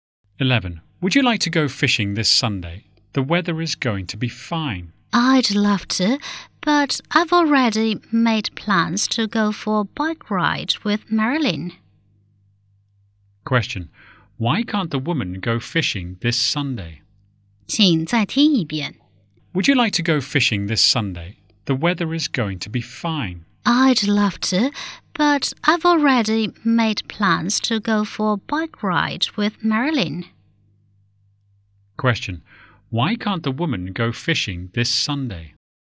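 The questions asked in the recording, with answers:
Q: Question. Why can't the woman go fishing this Sunday?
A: She has already planned to go for a bike ride with Marilyn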